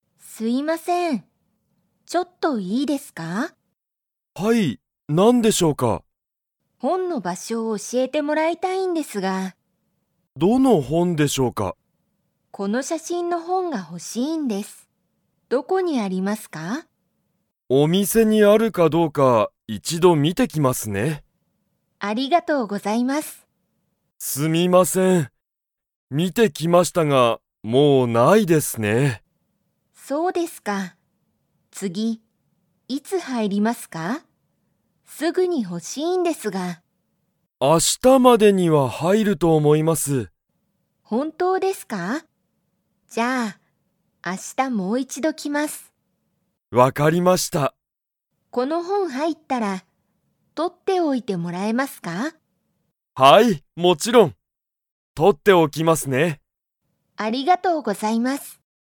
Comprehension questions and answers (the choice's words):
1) カオリは、その____の本ほんが欲ほしい。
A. 写真しゃしん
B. 場所ばしょ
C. 道みち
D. 街まち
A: 写真しゃしん

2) カオリは、今日きょうその本ほんを買かいますか?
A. はい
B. いいえ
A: いいえ

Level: Level 2